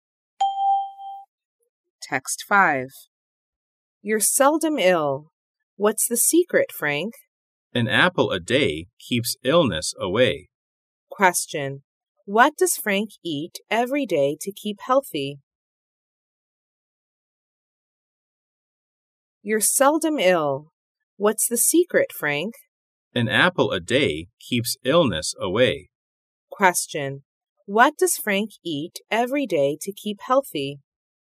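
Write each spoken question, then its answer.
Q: What does Frank eat every day to keep healthy?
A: An apple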